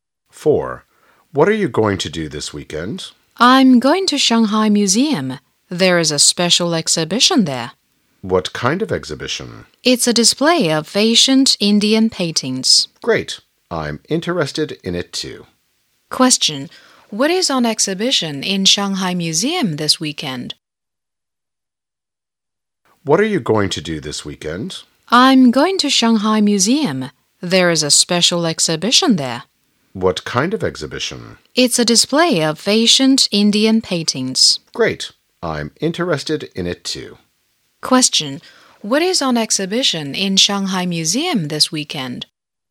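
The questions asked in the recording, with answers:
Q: What is on exhibition in Shanghai Museum this weekend?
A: Ancient Indian paintings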